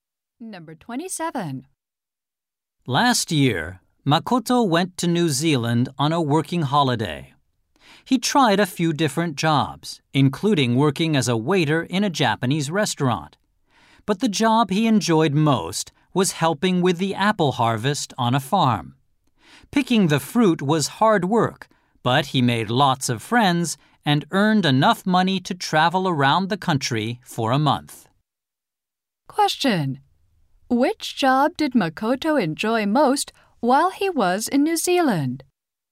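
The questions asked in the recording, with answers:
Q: Which job did Makoto enjoy most while he was in New Zealand?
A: Helping with the apple harvest on a farm.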